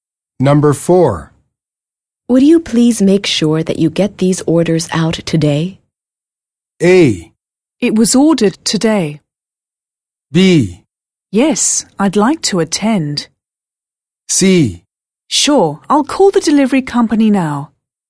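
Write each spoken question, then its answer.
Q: Would you please make sure that you get these orders out today?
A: C: Sure, I'll call the delivery company now.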